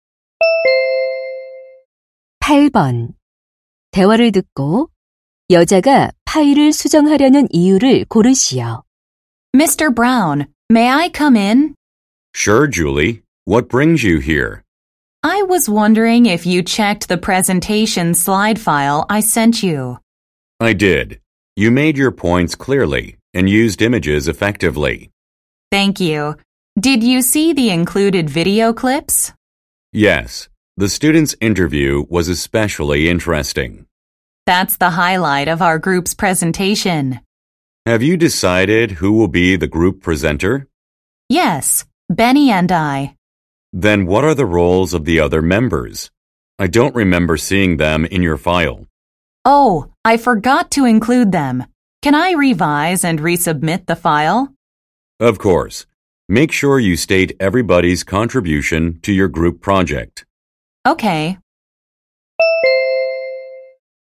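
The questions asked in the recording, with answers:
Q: 대화를 듣고 여자가 파일을 수정하려는 이유를 고르시오.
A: 다른 조원들의 역할을 넣지 않아서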